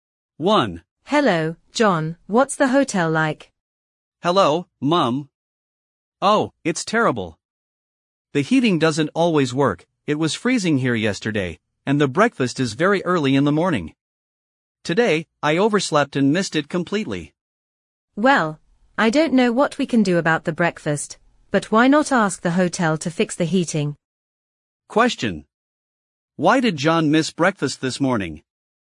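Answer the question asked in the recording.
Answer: He overslept.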